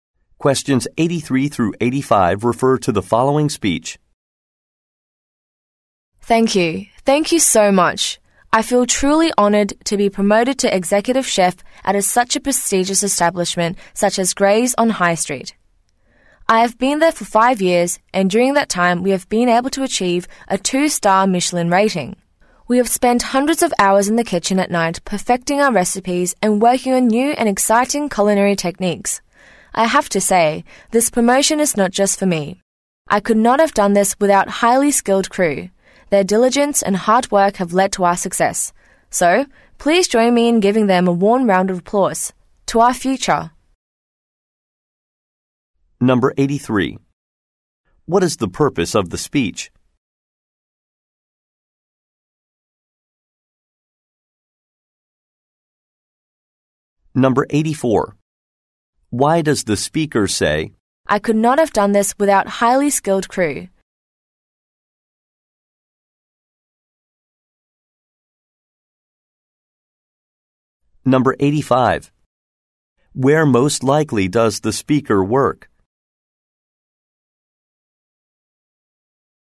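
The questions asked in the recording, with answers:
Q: What is the purpose of the speech?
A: To accept a promotion to executive chef

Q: Why does the speaker say,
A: To give credit to his team for the success

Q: Where most likely does the speaker work?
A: At a restaurant (Gray's on High Street)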